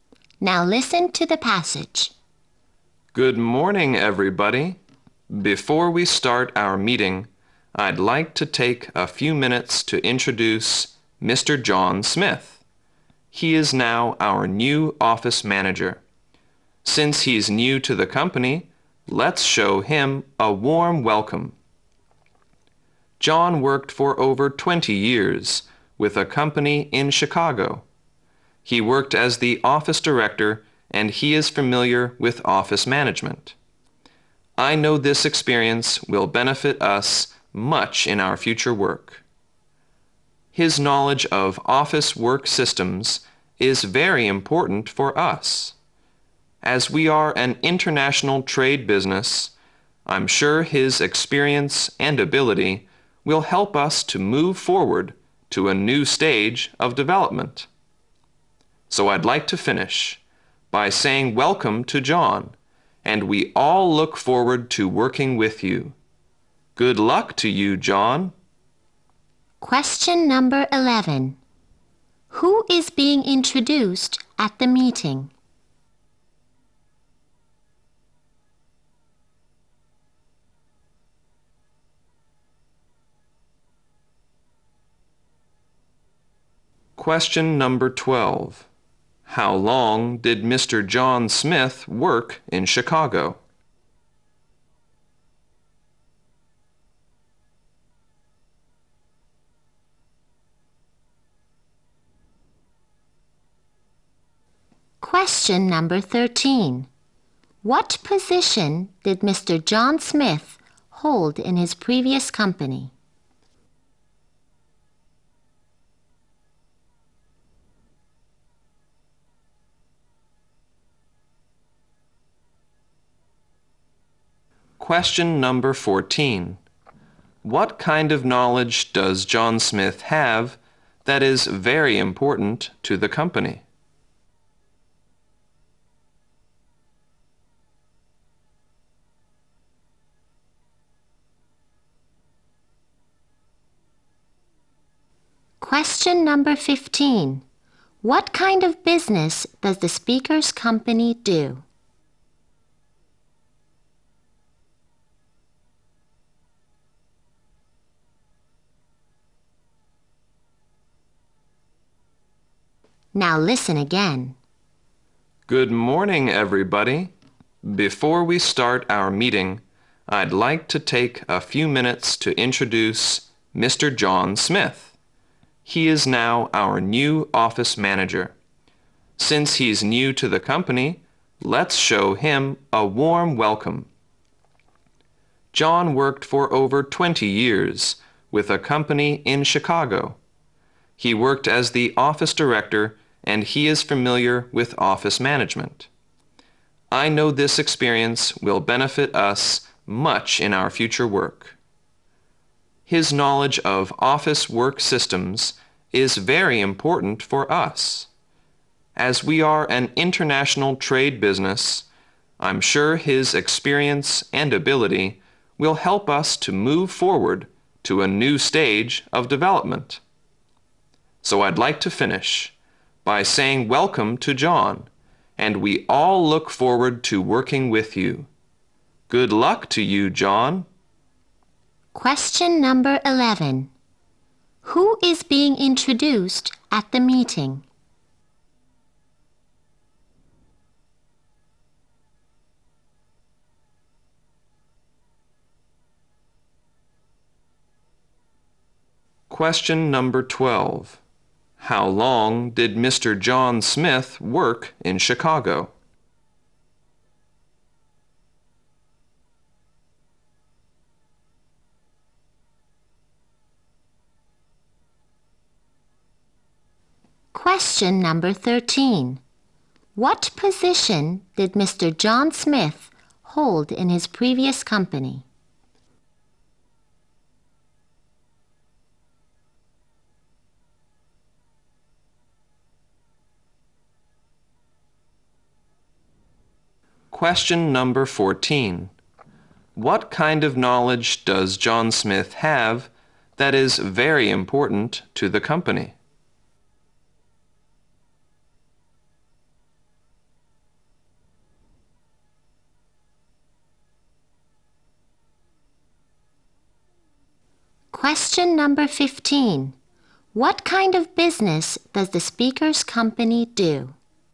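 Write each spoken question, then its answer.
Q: Who is being introduced at the meeting?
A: The new office manager, John Smith

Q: How long did Mr. John Smith work in Chicago?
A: Over 20 years

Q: What position did Mr. John Smith hold in his previous company?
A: Office director

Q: What kind of knowledge does John Smith have that is very important to the company?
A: Knowledge of office work systems

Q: What kind of business does the speaker's company do?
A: International trade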